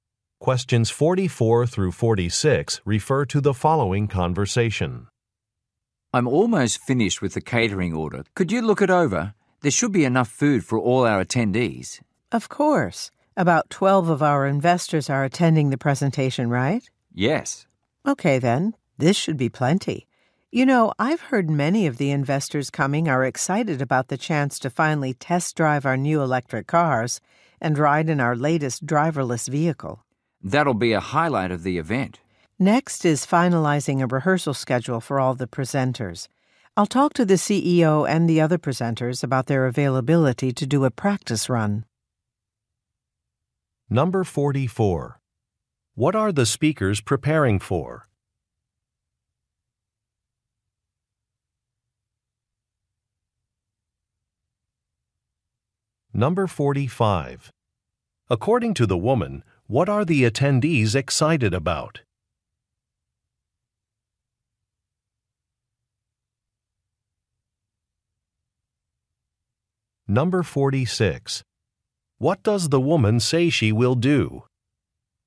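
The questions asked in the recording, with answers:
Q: What are the speakers preparing for?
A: A presentation for investors.

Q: According to the woman, what are the attendees excited about?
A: Test-driving the new vehicles.

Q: What does the woman say she will do?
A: Talk to the presenters about a rehearsal schedule.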